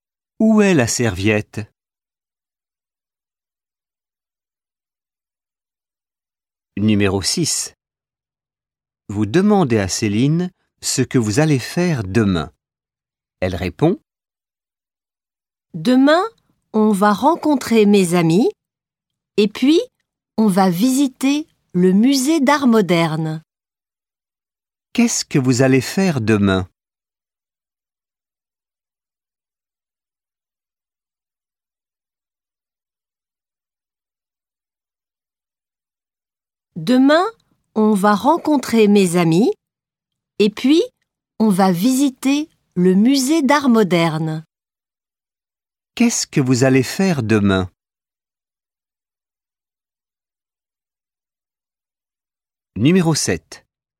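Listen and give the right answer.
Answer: Rencontrer ses amis et visiter le musée d'art moderne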